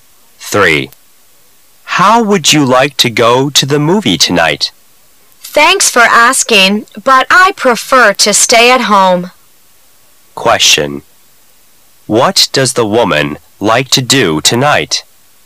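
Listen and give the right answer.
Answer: Stay at home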